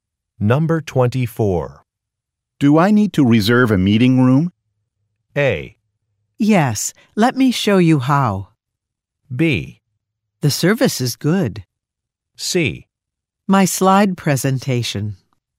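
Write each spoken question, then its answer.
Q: Do I need to reserve a meeting room?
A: A: Yes, let me show you how.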